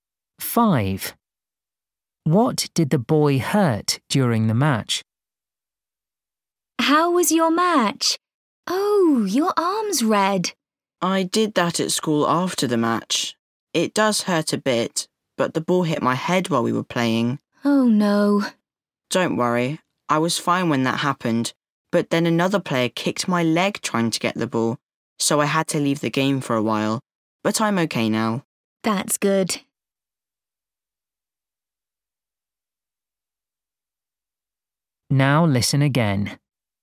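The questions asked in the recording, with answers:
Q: What did the boy hurt during the match?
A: his leg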